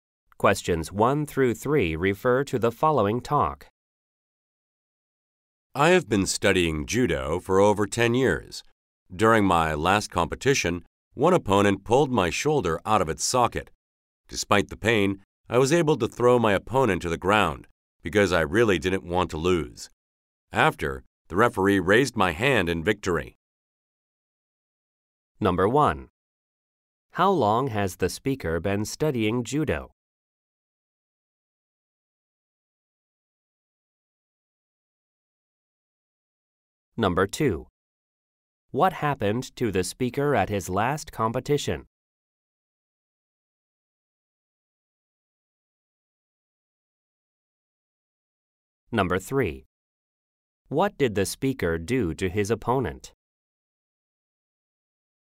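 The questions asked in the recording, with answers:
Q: How long has the speaker been studying judo?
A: Over 10 years

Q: What happened to the speaker at his last competition?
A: His shoulder was pulled out of its socket

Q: What did the speaker do to his opponent?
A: Threw him to the ground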